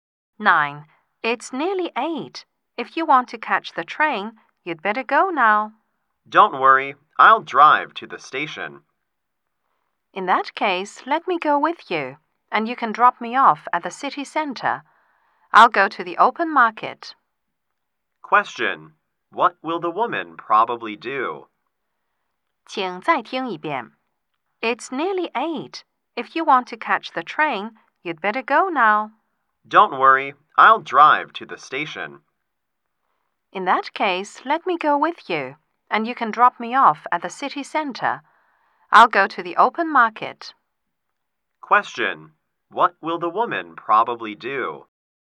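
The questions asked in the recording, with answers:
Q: What will the woman probably do?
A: Go to the open market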